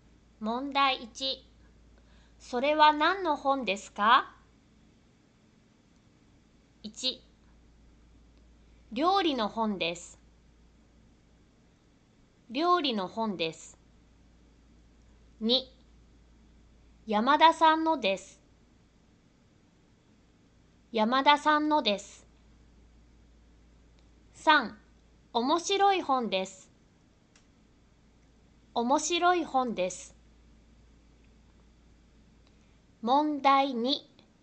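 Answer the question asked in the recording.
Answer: 1: 料理の本です。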